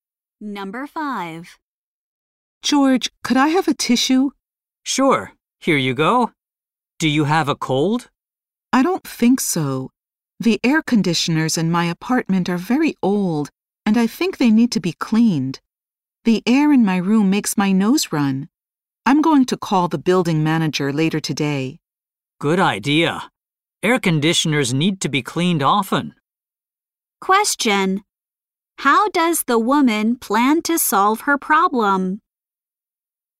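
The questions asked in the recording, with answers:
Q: How does the woman plan to solve her problem?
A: By calling the building manager about the old air conditioners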